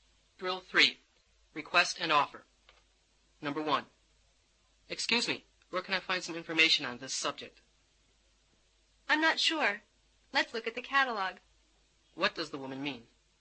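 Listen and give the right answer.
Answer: They should look in the catalog.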